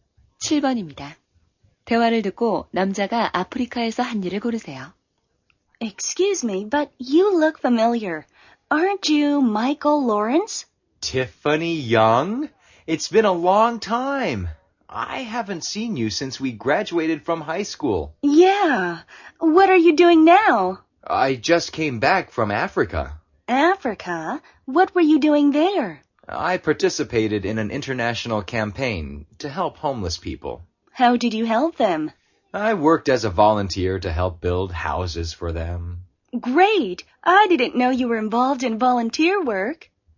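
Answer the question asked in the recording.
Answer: 노숙자를 위한 집 짓기 자원봉사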